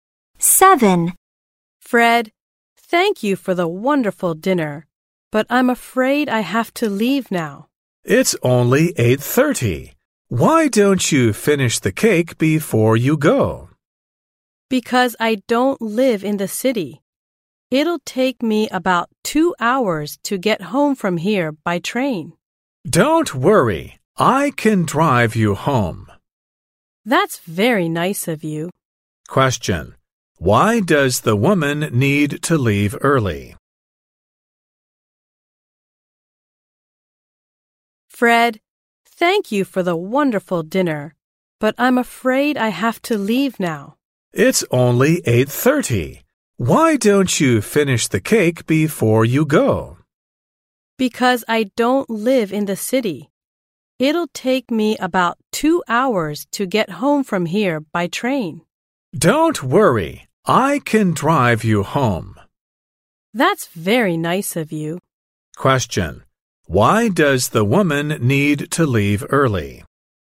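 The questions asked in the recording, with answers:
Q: Why does the woman need to leave early?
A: She doesn't live in the city; it takes about 2 hours to get home by train.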